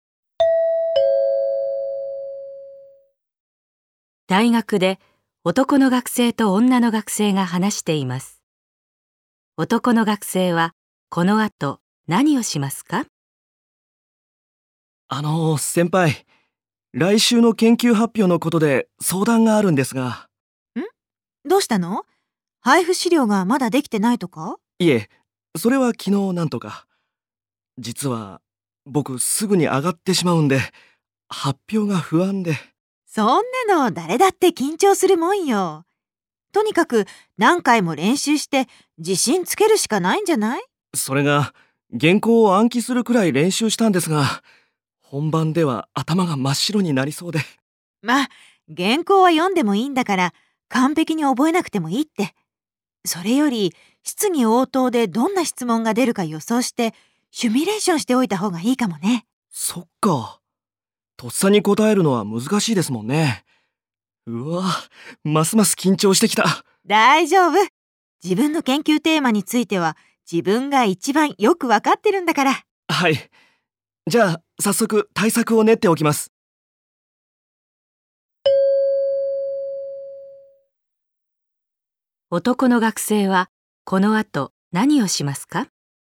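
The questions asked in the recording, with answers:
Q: 男の学生はこの後何をしますか?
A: 質疑応答で出る質問を予想してシミュレーションする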